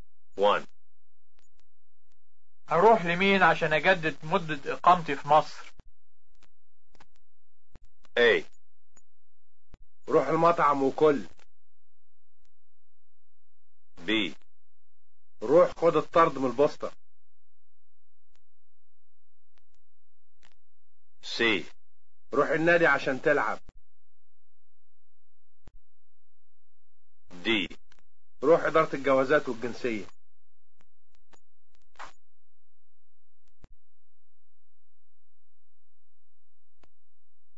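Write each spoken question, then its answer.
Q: أروح لمين عشان أجدد مدة إقامتي في مصر؟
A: D: روح إدارة الجوازات والجنسية.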